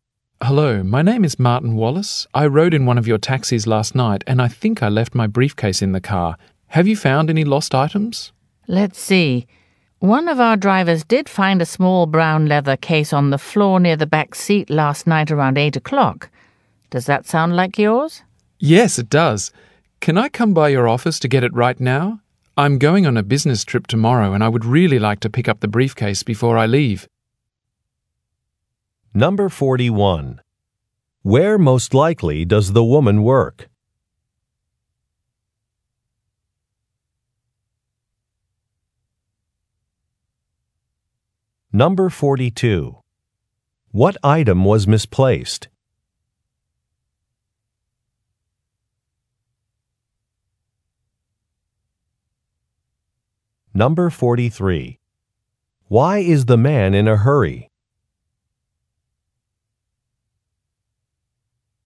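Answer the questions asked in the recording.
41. At a taxi company
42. A briefcase
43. He is going on a business trip tomorrow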